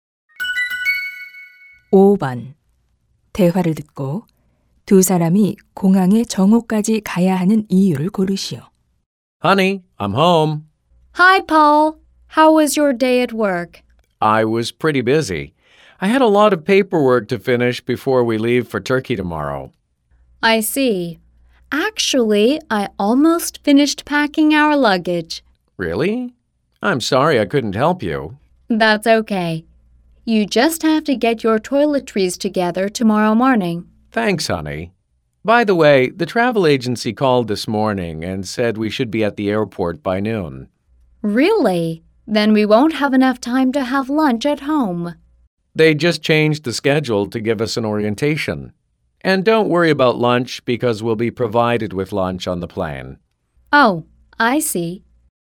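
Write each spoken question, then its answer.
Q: 대화를 듣고 두 사람이 공항에 정오까지 가야 하는 이유를 고르시오.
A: 오리엔테이션을 받기 위해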